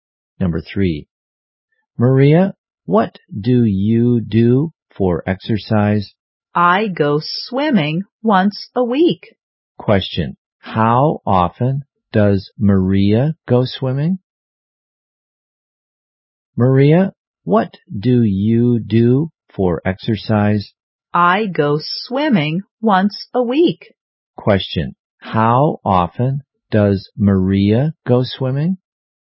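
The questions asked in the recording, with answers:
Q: How often does Maria go swimming?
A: Once a week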